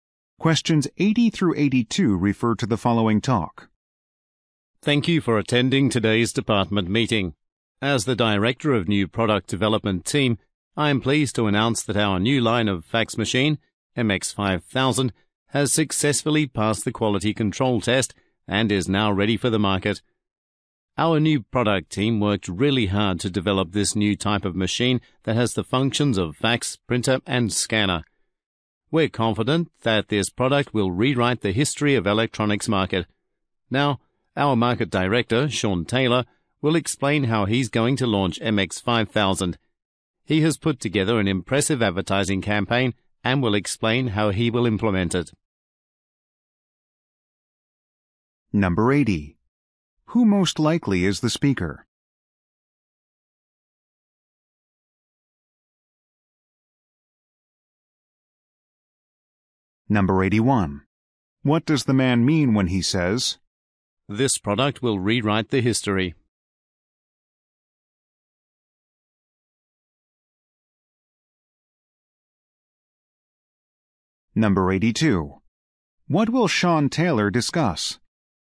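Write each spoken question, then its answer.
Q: Who most likely is the speaker?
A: Director of the New Product Development Team

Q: What will Sean Taylor discuss?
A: The advertising campaign to launch MX5000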